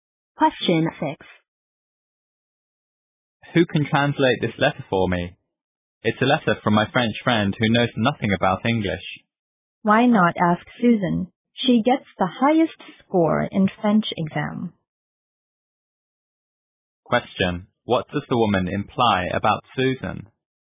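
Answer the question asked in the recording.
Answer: Susan is good at French and can translate the letter.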